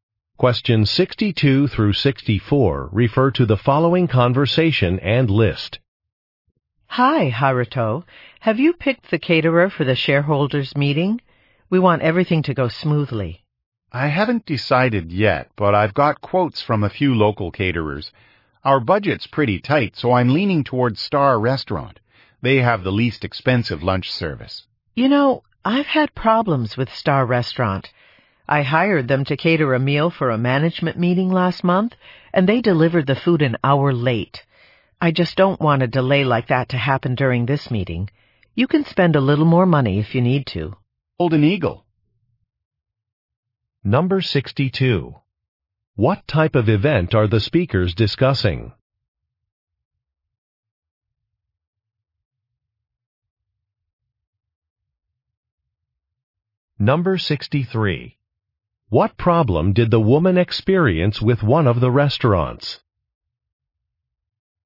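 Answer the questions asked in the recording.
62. A shareholders' meeting
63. The food was delivered an hour late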